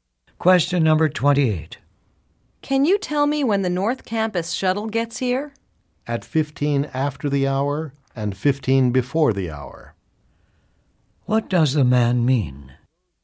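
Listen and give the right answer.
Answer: The shuttle comes every 30 minutes, at quarter past and quarter to the hour.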